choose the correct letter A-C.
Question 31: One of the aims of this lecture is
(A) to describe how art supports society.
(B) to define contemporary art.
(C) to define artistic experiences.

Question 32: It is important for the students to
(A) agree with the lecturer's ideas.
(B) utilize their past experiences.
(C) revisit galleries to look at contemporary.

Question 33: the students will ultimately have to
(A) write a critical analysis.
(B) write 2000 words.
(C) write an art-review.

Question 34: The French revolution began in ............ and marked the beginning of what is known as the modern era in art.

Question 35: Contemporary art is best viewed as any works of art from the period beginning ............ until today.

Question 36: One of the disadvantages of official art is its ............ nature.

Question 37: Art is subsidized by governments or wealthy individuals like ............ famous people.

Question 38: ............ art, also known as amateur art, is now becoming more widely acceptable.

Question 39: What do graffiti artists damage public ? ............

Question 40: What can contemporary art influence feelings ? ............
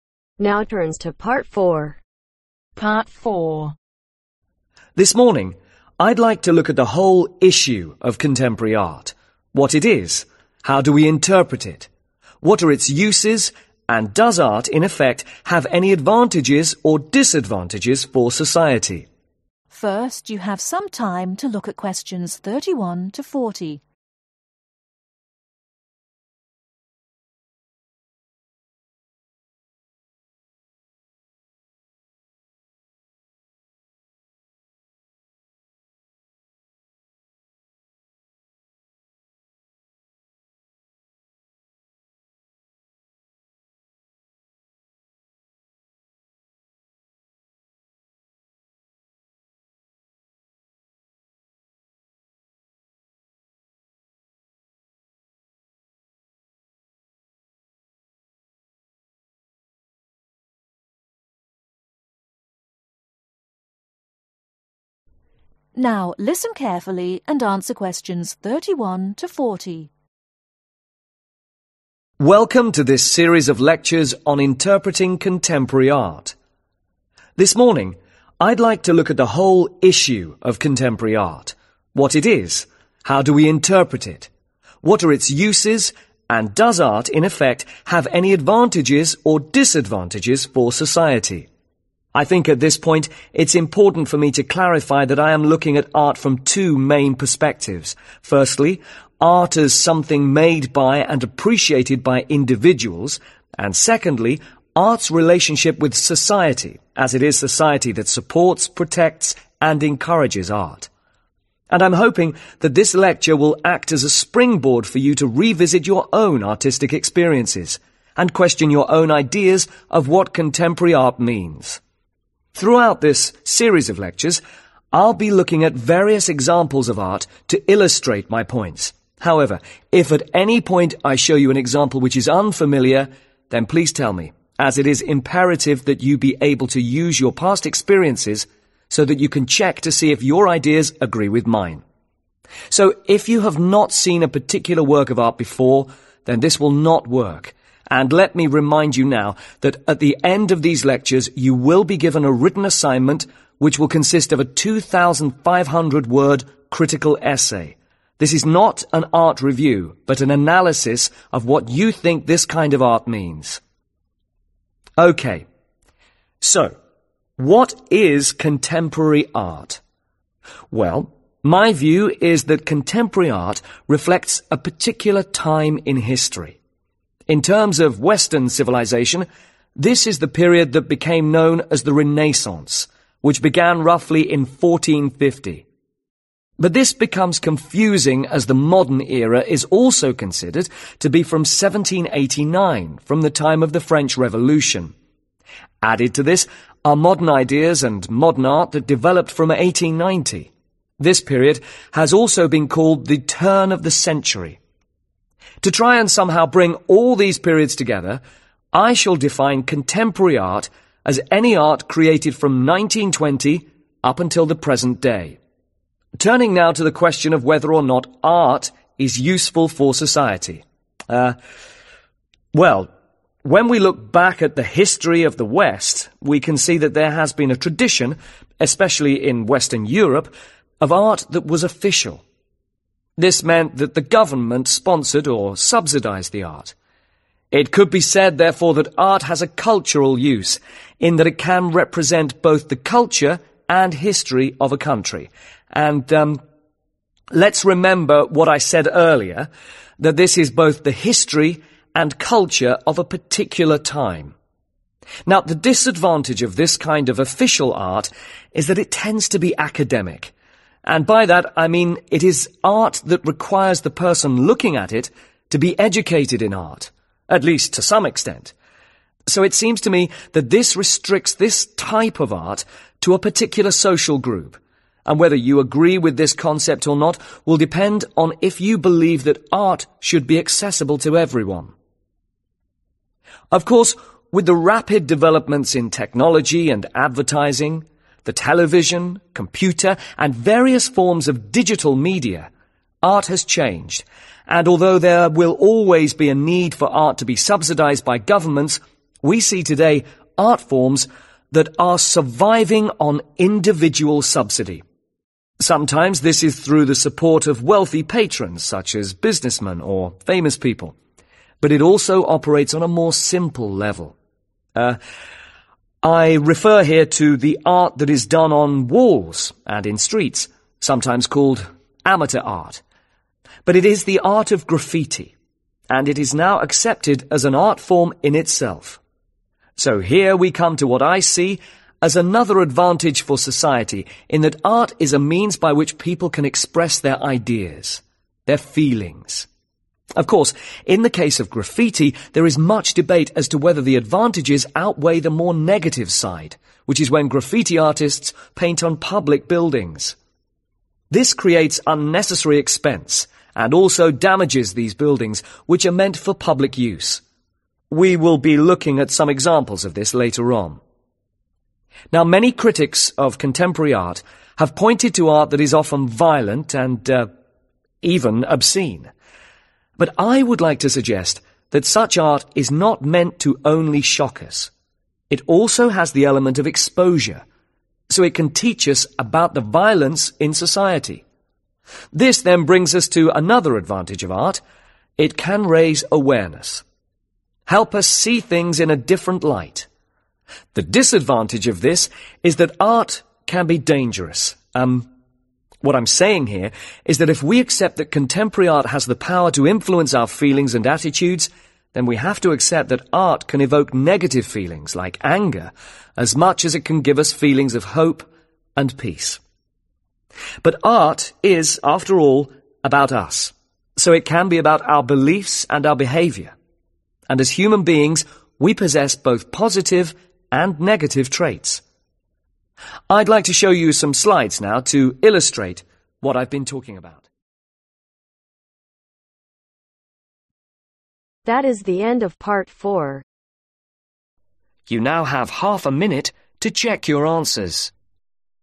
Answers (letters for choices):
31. B
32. B
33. A
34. 1789
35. 1920
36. Academic
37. Businessmen
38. Graffiti
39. Buildings
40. Attitudes